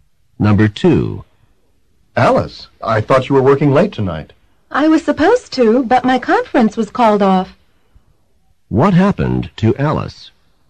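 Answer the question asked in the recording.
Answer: Her conference was cancelled.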